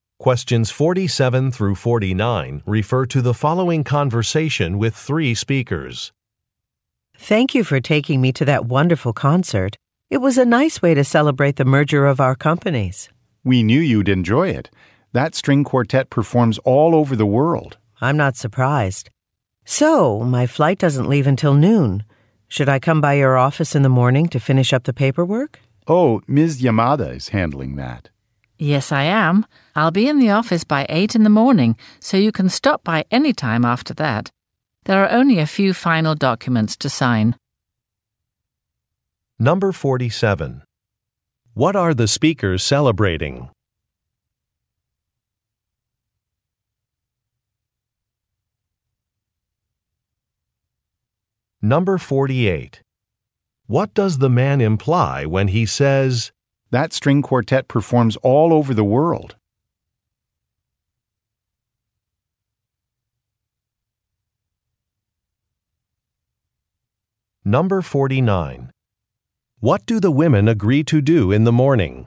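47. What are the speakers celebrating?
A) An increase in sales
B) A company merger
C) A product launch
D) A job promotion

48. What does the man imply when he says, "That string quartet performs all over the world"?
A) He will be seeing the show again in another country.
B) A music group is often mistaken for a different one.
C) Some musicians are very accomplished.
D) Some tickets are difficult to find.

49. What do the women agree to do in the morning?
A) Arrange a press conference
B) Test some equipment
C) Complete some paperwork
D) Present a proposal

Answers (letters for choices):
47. B
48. C
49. C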